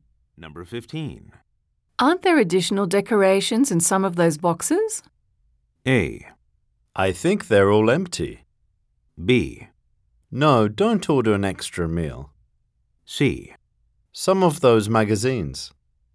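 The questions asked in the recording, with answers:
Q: Aren't there additional decorations in some of those boxes?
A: A: I think they're all empty.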